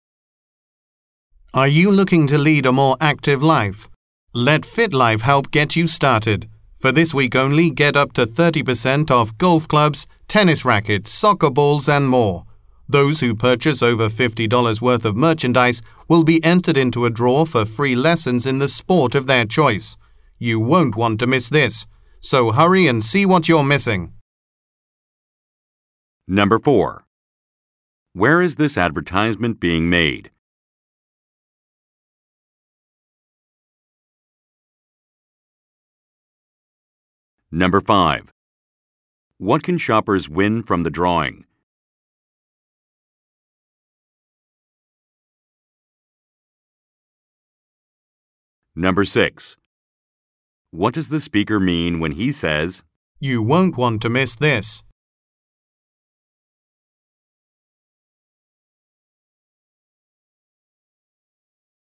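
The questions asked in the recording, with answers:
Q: What can shoppers win from the drawing?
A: Free lessons in the sport of their choice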